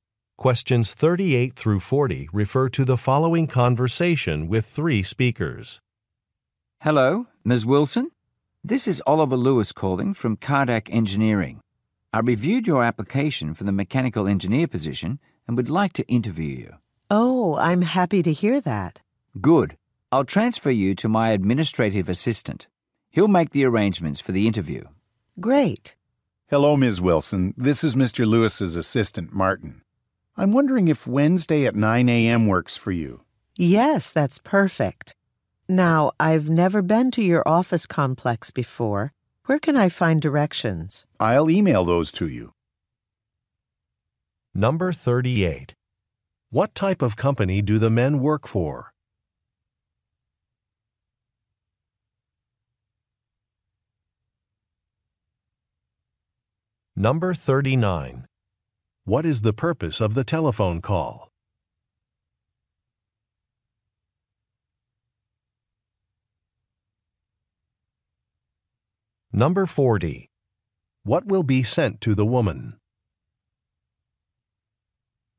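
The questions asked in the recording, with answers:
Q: What type of company do the men work for?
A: An engineering company

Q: What is the purpose of the telephone call?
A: To arrange a job interview

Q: What will be sent to the woman?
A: Directions to the office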